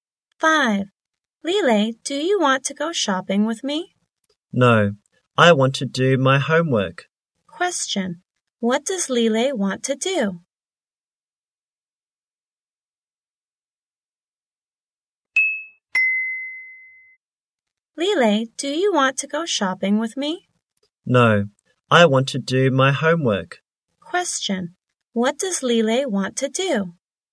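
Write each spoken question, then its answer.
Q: Question, what does Lele want to do?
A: Do her homework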